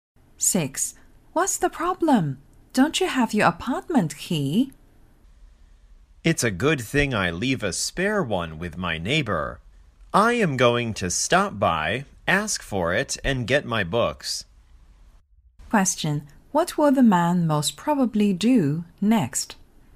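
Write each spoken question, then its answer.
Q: What will the man most probably do next?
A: Get the spare key from his neighbor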